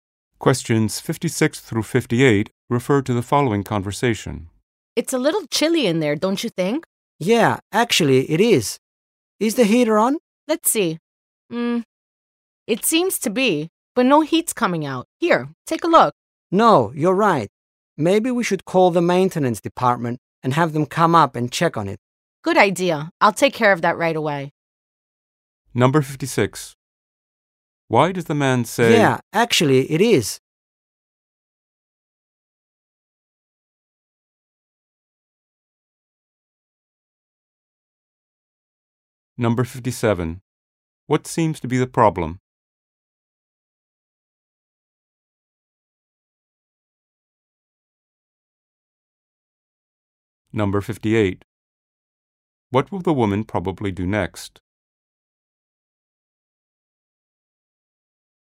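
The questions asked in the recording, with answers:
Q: What seems to be the problem?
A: The heater is on but no heat is coming out.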